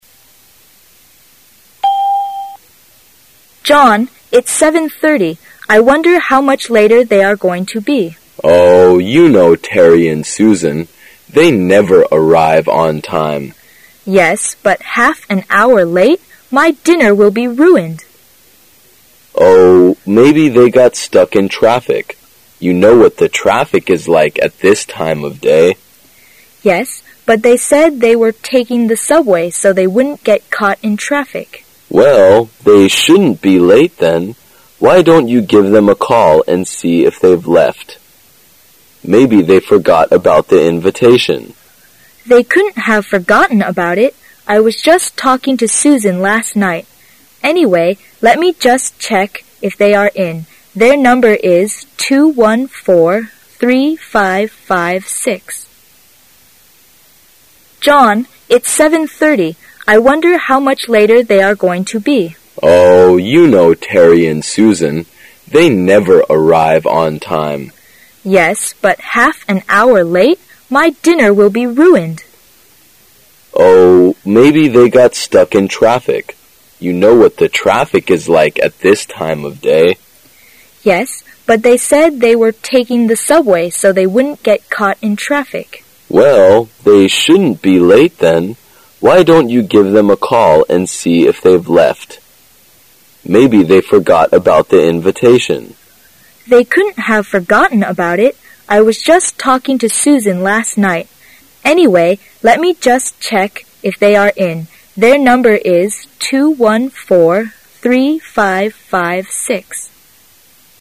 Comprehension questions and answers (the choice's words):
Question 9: What will they probably do?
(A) To have a meeting.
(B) To have a party.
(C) To have dinner.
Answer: To have dinner.

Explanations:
[解析] 根据对话"我的晚餐都要给毁了"。故本题答案为C。

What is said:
[听力原文] 13-16 W: John, it's 7:30. I wonder how much later they are going to be? M: Oh, you know Terry and Susan. They never arrive on time. W: Yes, but half an hour late! My dinner will be ruined. M: Oh, maybe they got stuck in traffic. You know what the traffic is like at this time of day. W: Yes, but they said they were taking the subway so they wouldn't get caught in traffic. M: Well, they shouldn't be late then. Why don't you give them a call and see if they've left. Maybe they forgot about the invitation. W: They couldn't have forgotten about it. I was just talking to Susan last night. Anyway, let me just check if they are in. Their number is 2143556.